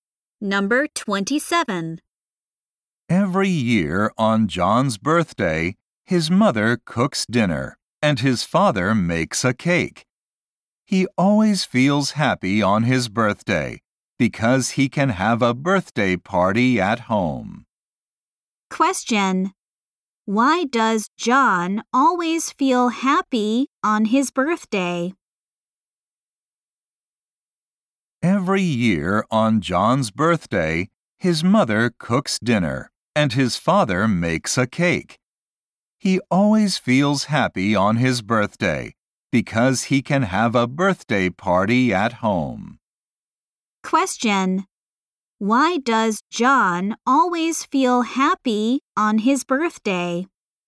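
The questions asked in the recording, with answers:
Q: Why does John always feel happy on his birthday?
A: He can have a birthday party at home.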